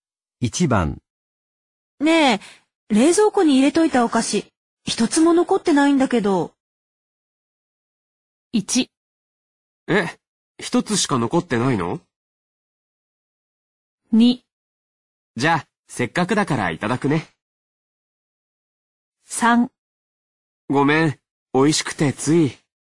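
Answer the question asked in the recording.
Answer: 3: ごめん。美味しくてつい。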